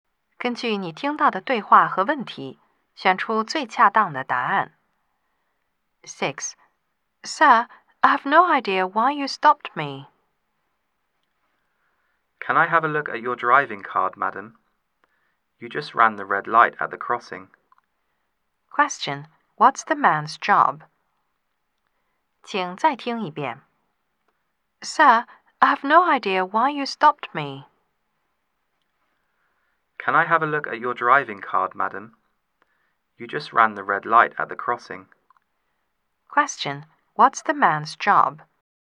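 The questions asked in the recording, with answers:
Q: Question, what's the man's job?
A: A policeman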